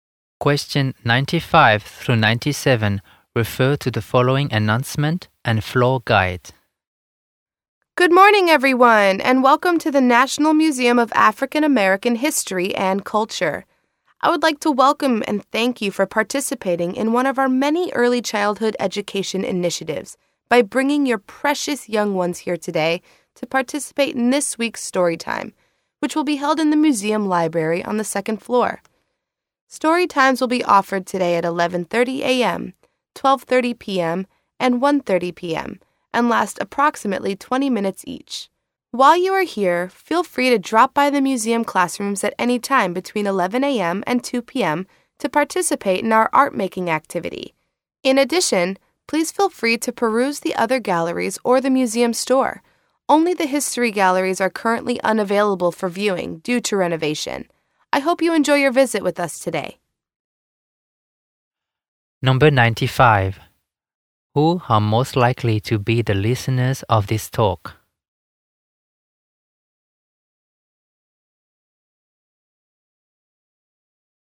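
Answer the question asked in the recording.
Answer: Parents with young children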